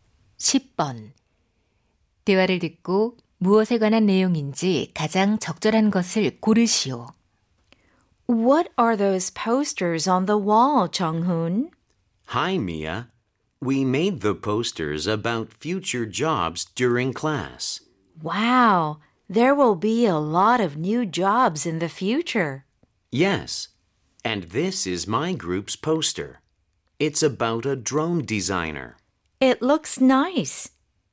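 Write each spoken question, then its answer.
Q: 대화를 듣고 무엇에 관한 내용인지 가장 적절한 것을 고르시오.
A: 미래 직업에 관한 포스터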